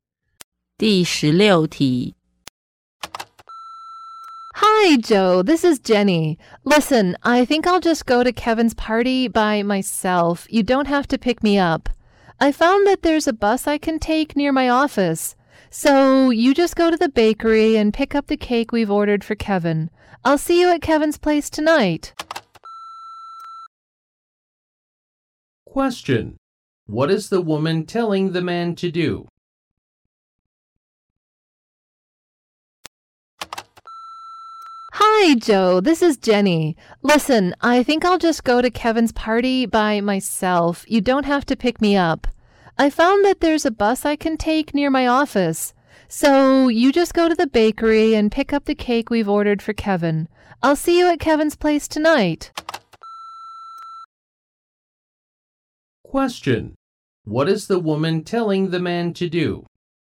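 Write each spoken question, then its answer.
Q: What is the woman telling the man to do?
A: Pick up the cake for Kevin at the bakery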